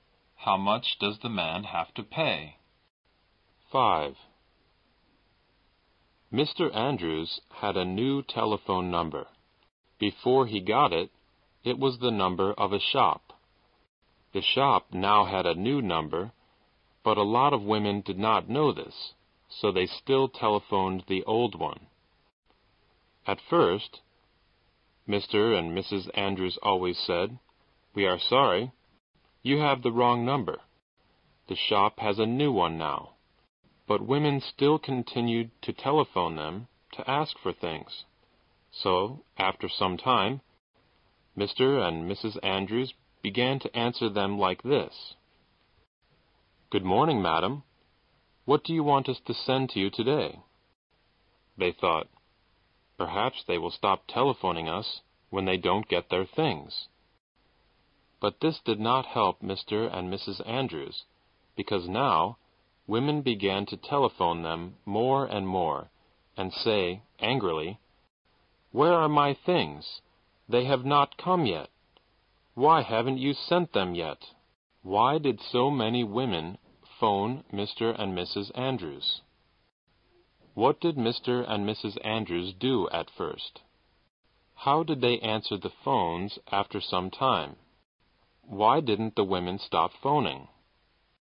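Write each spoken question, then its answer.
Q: How did they answer the phones after some time?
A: "Good morning, madam. What do you want us to send to you today?"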